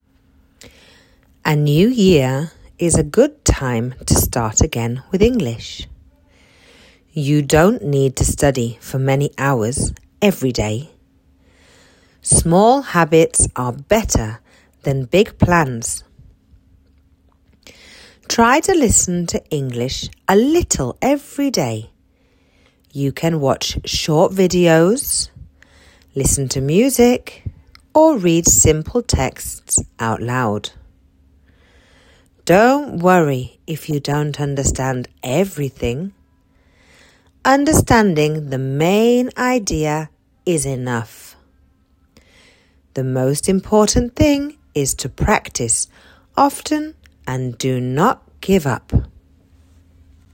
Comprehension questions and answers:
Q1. Is the new year a good time to start again with English?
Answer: Yes, the new year is a good time to start again with English.

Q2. Do you need to study many hours every day?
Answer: No, you don't need to study many hours every day.

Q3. What is better: small habits or big plans?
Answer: Small habits are better than big plans.

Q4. Should you worry if you don't understand everything?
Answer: No, you shouldn't worry if you don't understand everything.

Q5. What is the most important thing?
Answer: The most important thing is to practise often and not give up.